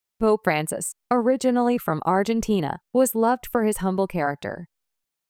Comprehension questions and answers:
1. Pope Francis, originally from Argentina, ( ).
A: was loved for his humble character

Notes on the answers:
▶「humble(謙虚な)」 という形容詞を知らず書き取れなかった。 ⇒ 語彙力が問われる箇所です。 ▶「was loved」に不要な関係代名詞を追加して「who was loved」と書いてしまった。 ⇒「Pope Francis, originally from Argentina, 」がコンマで区切られた同格の主語なので、文法的に関係代名詞「who」は不要です。 who」を答案に入れた人は、実際には聞こえていない音を誤った文法解釈で補ってしまったのでしょう。

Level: 中級脱出